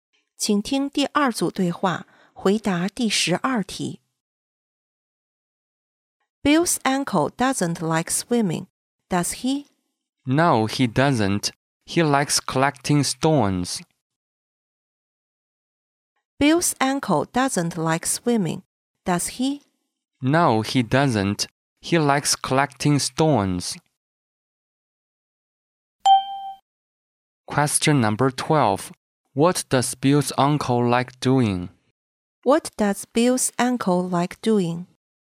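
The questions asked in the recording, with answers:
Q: What does Bill's uncle like doing?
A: Collecting stones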